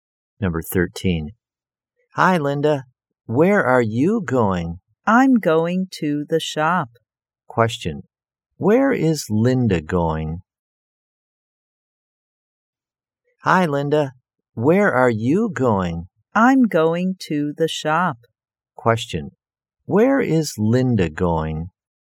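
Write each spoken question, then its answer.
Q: Where is Linda going?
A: To the shop.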